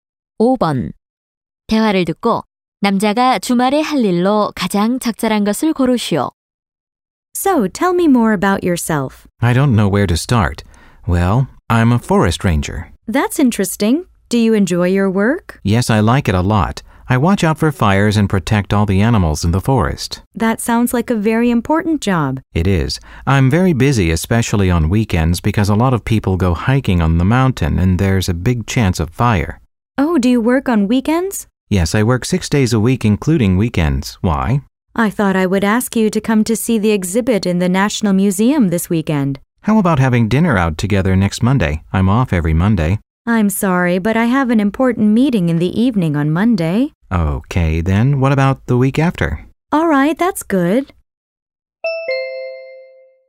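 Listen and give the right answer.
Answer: 산림 감시원으로 일하기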